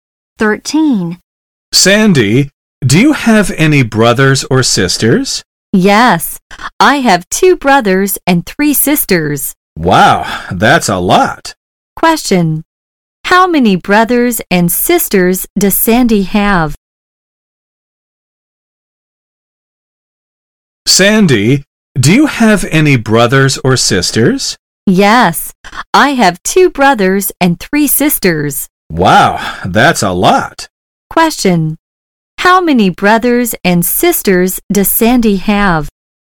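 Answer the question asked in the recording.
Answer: Two brothers and three sisters.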